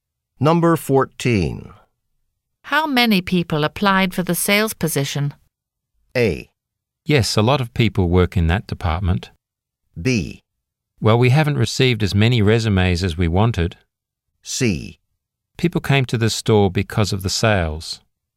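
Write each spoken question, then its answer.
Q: How many people applied for the sales position?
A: B: Well, we haven't received as many resumes as we wanted.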